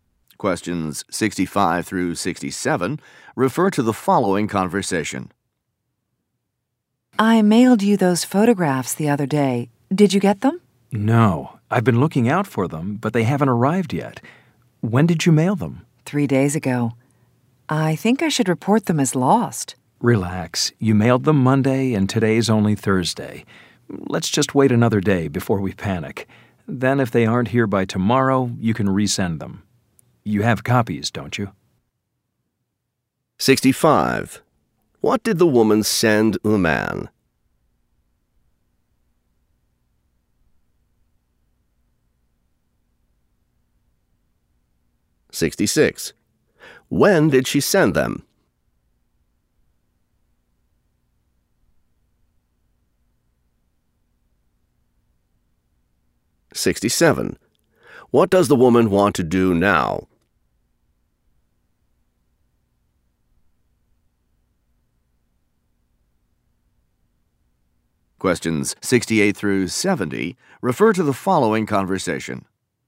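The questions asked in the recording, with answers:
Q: What did the woman send the man?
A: Photographs

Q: When did she send them?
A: Monday

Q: What does the woman want to do now?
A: Report them as lost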